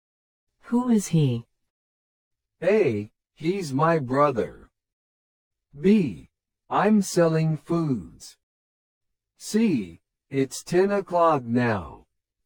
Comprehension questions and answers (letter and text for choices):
Select the best response to the question or statement and mark the letter (A), (B), or (C) on your answer sheet.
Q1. Who is he?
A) He's my brother.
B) I'm selling foods.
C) It's ten o'clock now.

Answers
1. A) He's my brother.

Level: 初級者用